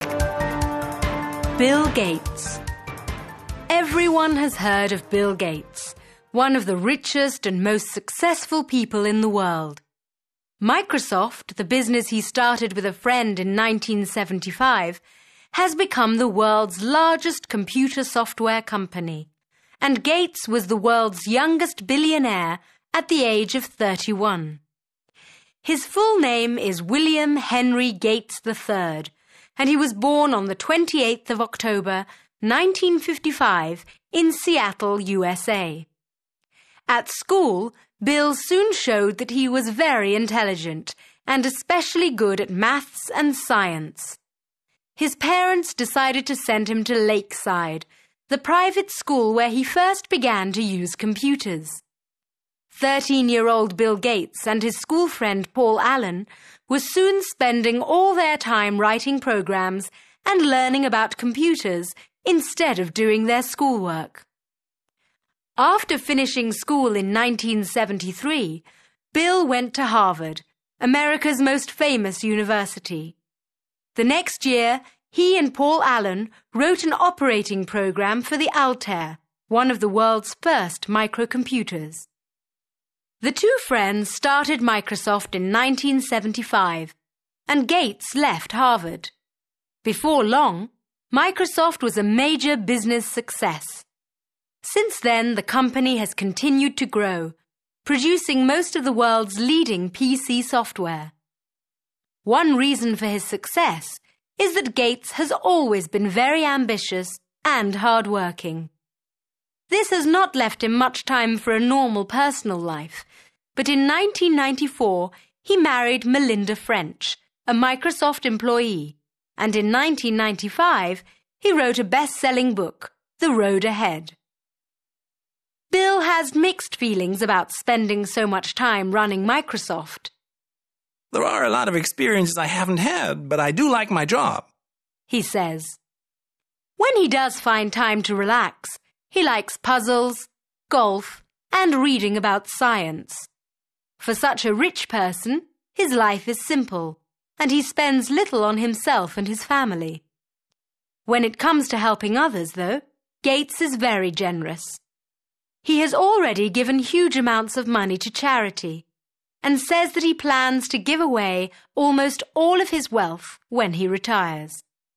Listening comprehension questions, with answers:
3. Listen and complete the table.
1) Born: 28 October, (1).................., in Seattle, USA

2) – finished school in (2)..................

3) – married Melinda French in (3)..................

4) – wrote The Road Ahead in (4)..................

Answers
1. 1955
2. 1973
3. 1994
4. 1995

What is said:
Bill Gates
Everyone has heard of Bill Gates, one of the richest and most successful people in the world. Microsoft, the business he started with a friend in 1975, has become the world's largest computer software company, and Gates was the world's youngest billionaire at the age of 31.
His full name is William Henry Gates III, and he was born on 28th October, 1955, in Seattle, USA. At school, Bill soon showed that he was very intelligent, and especially good at Maths and Science. His parents decided to send him to Lakeside, the private school where he first began to use computers. 13-year-old Bill Gates and his schoolfriend Paul Allen were soon spending all their time writing programs and learning about computers instead of doing their schoolwork!
After finishing school in 1973, Bill went to Harvard, America's most famous university. The next year, he and Paul Allen wrote an operating program for the Altair, one of the world's first microcomputers. The two friends started Microsoft in 1975, and Gates left Harvard. Before long, Microsoft was a major business success. Since then, the company has continued to grow, producing most of the world's leading PC software. One reason for his success is that Gates has always been very ambitious and hardworking. This has not left him much time for a normal personal life, but in 1994 he married Melinda French, a Microsoft employee, and in 1995 he wrote a best-selling book, The Road Ahead.
Bill has mixed feelings about spending so much time running Microsoft. "There are a lot of experiences I haven't had, but I do like my job," he says. When he does find time to relax, he likes puzzles, golf and reading about science. For such a rich person, his life is simple, and he spends little on himself and his family. When it comes to helping others, though, Gates is very generous. He has already given huge amounts of money to charity, and says that he plans to give away almost all of his wealth when he retires.